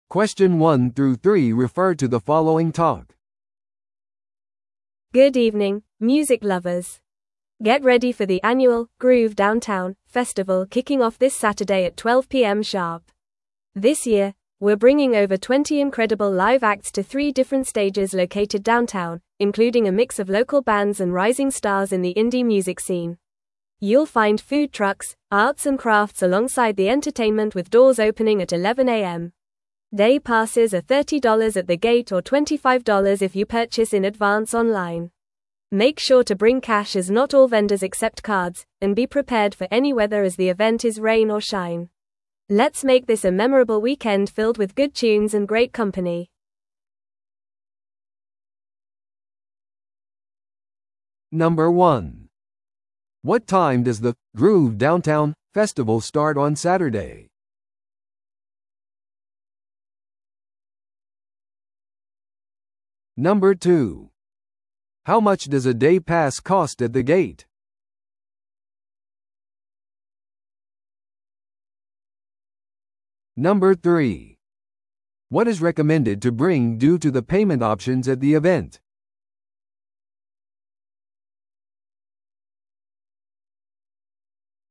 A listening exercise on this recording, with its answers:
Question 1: What time does the 'Groove Downtown' festival start on Saturday?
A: 正午

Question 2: How much does a day pass cost at the gate?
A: 30ドル

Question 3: What is recommended to bring due to the payment options at the event?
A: 現金

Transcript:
Good evening, music lovers! Get ready for the annual 'Groove Downtown' festival kicking off this Saturday at 12pm sharp. This year, we're bringing over 20 incredible live acts to three different stages located downtown, including a mix of local bands and rising stars in the indie music scene. You'll find food trucks, arts and crafts alongside the entertainment with doors opening at 11am. Day passes are $30 at the gate or $25 if you purchase in advance online. Make sure to bring cash as not all vendors accept cards, and be prepared for any weather as the event is rain or shine. Let's make this a memorable weekend filled with good tunes and great company!